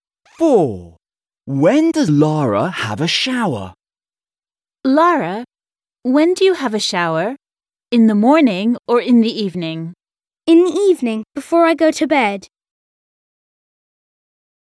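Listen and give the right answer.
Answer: In the evening, before bed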